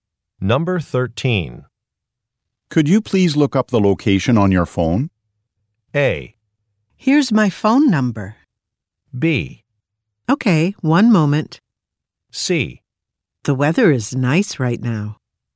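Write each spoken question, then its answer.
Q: Could you please look up the location on your phone?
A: B: Okay, one moment.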